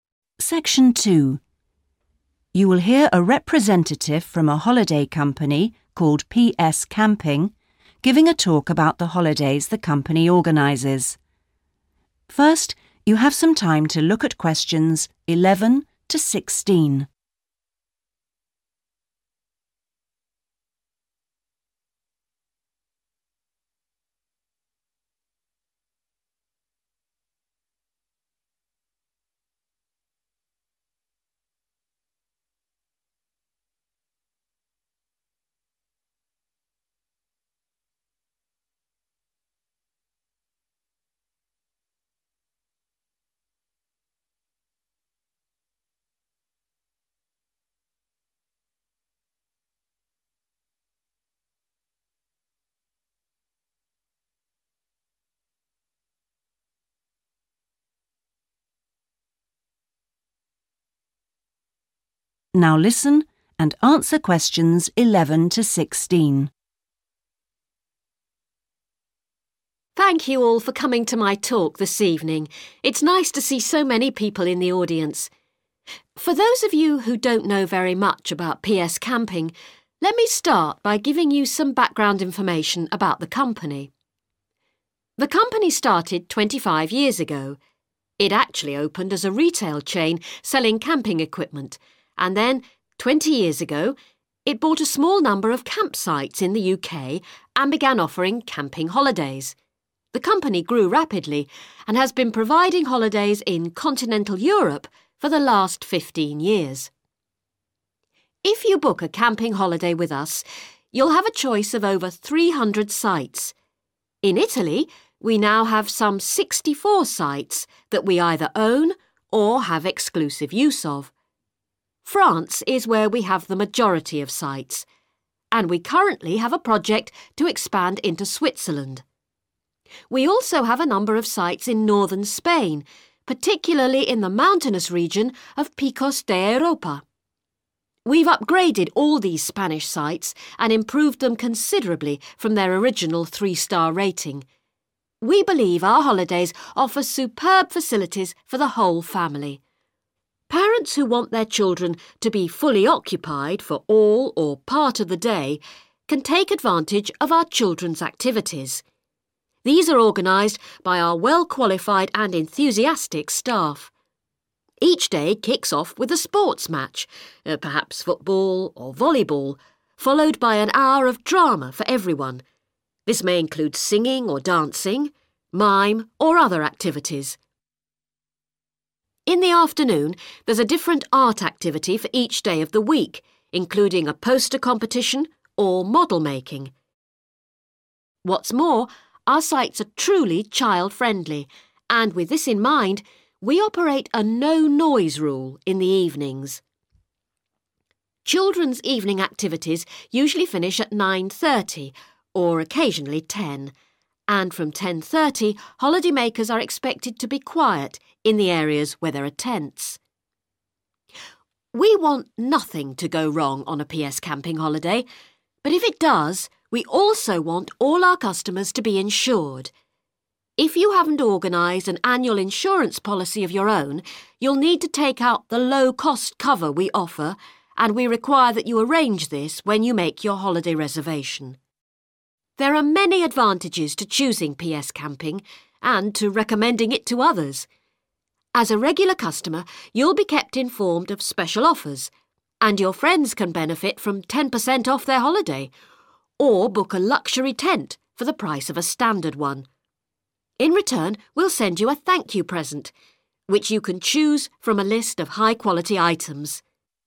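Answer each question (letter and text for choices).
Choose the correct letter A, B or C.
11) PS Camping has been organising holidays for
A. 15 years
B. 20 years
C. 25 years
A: B. 20 years

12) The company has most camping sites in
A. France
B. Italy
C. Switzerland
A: A. France

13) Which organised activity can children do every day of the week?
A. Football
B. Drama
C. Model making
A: B. Drama

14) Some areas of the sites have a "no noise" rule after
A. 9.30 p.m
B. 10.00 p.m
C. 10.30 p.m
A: C. 10.30 p.m

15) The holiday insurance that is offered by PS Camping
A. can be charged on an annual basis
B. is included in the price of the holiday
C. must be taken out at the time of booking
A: C. must be taken out at the time of booking

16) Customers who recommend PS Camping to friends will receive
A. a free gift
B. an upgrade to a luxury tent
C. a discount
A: A. a free gift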